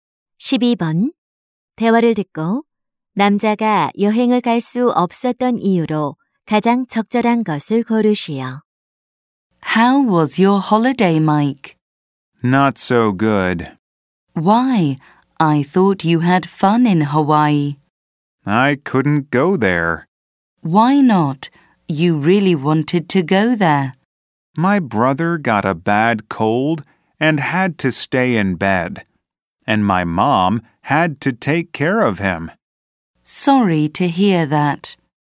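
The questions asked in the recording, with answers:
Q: 대화를 듣고 남자가 여행을 갈 수 없었던 이유로 가장 적절한 것을 고르시오.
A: 남동생이 심한 감기에 걸려서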